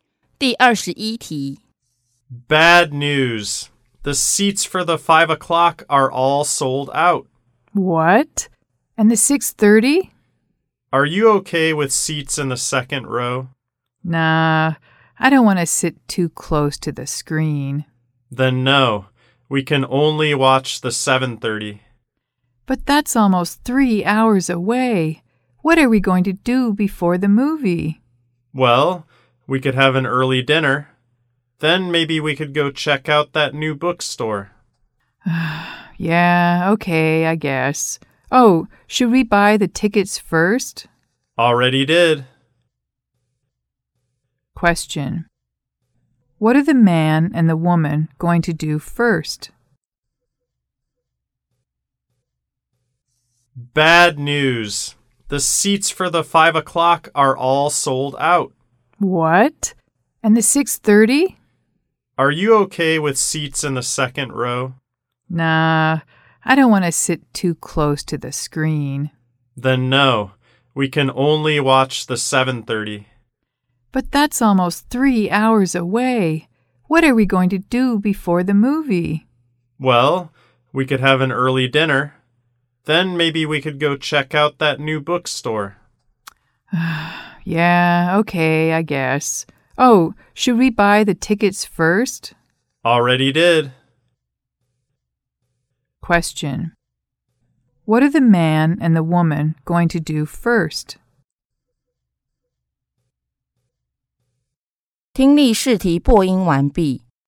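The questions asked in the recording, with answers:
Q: What are the man and the woman going to do first?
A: Have an early dinner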